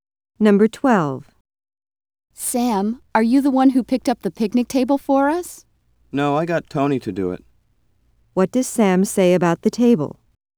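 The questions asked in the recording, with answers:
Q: What does Sam say about the table?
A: He had Tony pick it up.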